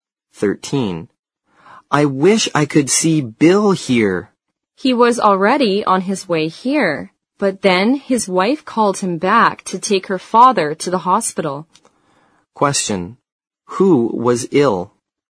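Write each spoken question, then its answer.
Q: Who was ill?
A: Bill's wife's father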